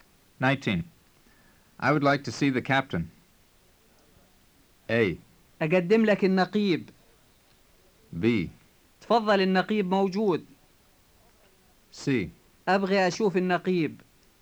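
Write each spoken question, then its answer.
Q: I would like to see the captain.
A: C: أبغي أشوف النقيب.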